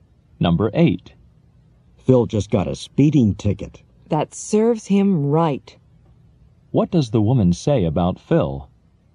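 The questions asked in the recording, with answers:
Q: What does the woman say about Phil?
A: He deserved the ticket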